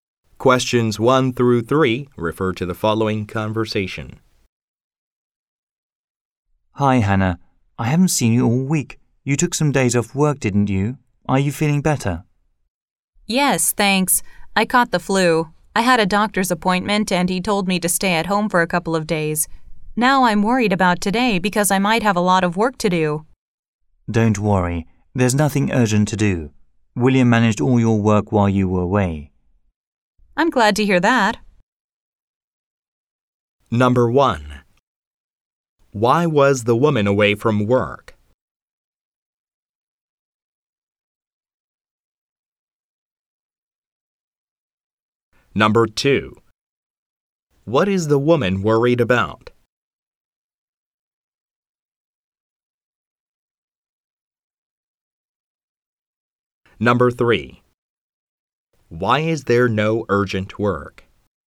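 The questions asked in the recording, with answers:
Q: Why was the woman away from work?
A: She had the flu.

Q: What is the woman worried about?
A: Having a lot of work to do today.

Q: Why is there no urgent work?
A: William handled her work while she was away.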